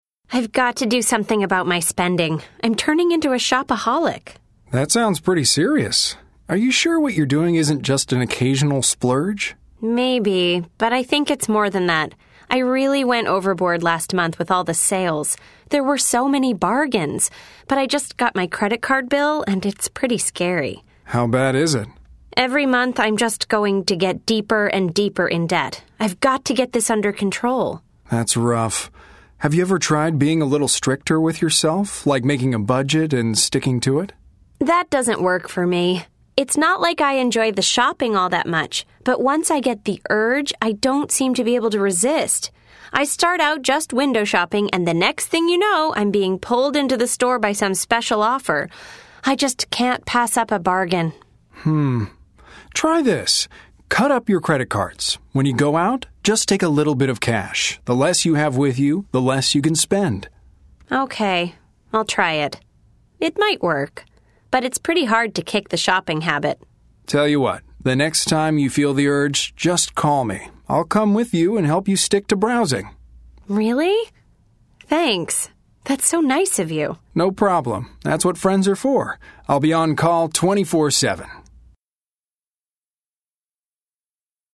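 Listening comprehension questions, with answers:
Listen to the conversation. Then choose the correct answers.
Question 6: Why does the woman think she is a shopaholic?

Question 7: What is the biggest attraction about shopping for the woman?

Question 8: What does the man suggest to help the woman?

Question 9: What does the man offer to help the woman do?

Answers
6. She overspent in the sales and is getting deeper in debt.
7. Bargains and special offers
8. Cut up her credit cards and take only a little cash
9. Stick to browsing when she goes shopping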